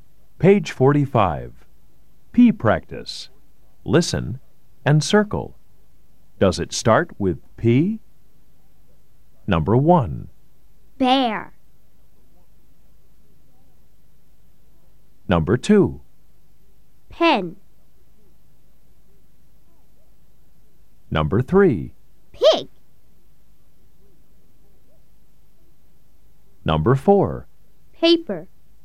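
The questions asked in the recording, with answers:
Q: Does it start with P? Number 1. Bear.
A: No

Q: Paper.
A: Yes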